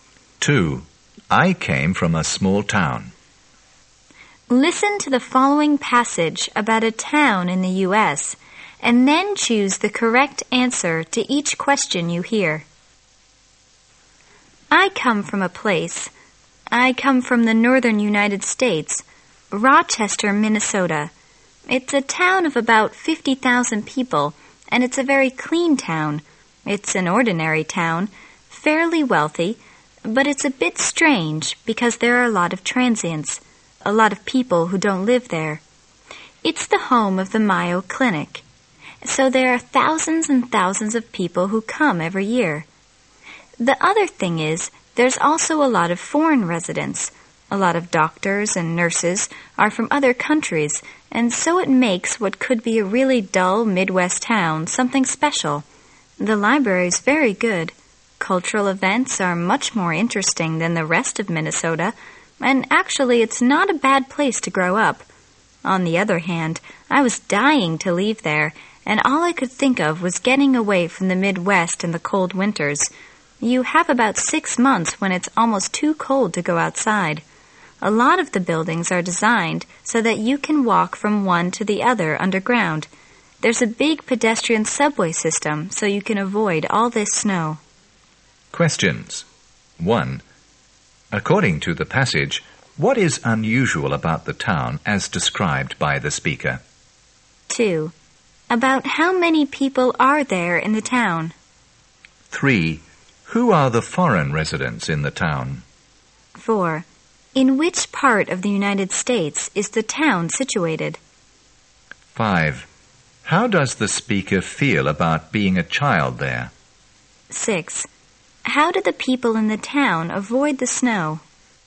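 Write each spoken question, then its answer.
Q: About how many people are there in the town?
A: About 50,000

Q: Who are the foreign residents in the town?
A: Doctors and nurses

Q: In which part of the United States is the town situated?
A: In the north (the Midwest)

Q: How do the people in the town avoid the snow?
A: They walk between buildings underground, through a pedestrian subway system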